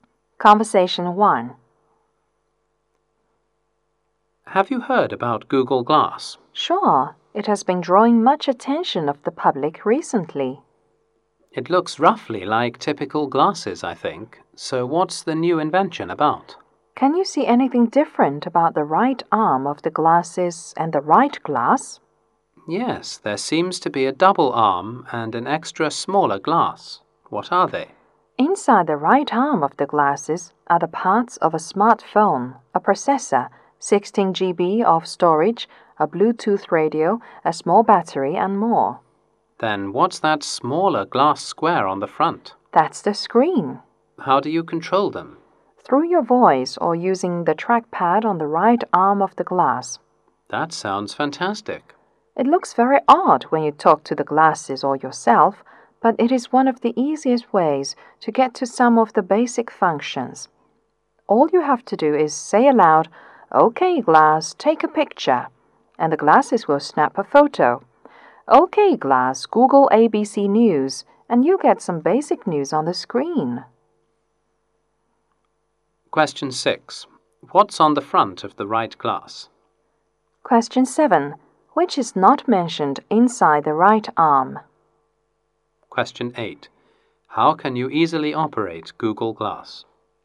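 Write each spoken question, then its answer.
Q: What's on the front of the right glass?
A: The screen

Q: How can you easily operate Google Glass?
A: By voice or the trackpad on the right arm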